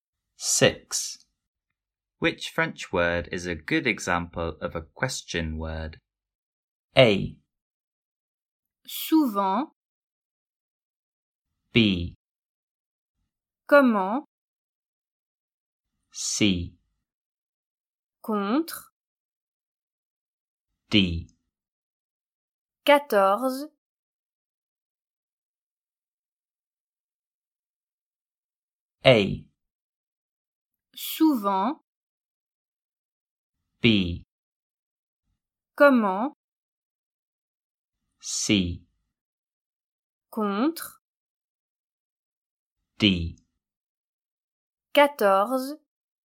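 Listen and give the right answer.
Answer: B: Comment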